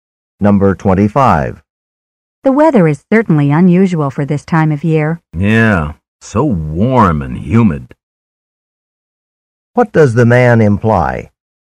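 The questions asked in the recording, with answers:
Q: What does the man imply?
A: The weather is usually not this warm and humid at this time of year.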